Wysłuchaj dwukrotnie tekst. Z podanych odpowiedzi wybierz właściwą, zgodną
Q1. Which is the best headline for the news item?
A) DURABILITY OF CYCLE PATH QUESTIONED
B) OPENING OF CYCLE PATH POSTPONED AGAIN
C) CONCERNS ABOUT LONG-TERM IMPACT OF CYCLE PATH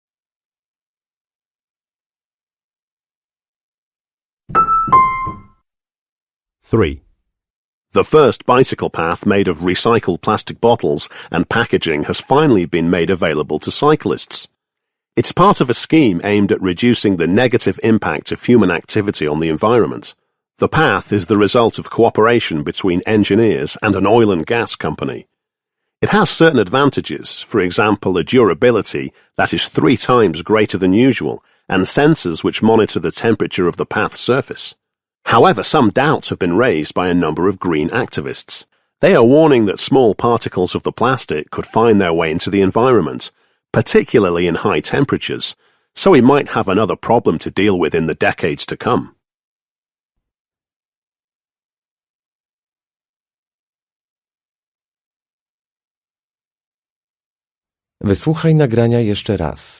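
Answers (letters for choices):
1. C

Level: matura rozszerzona 2022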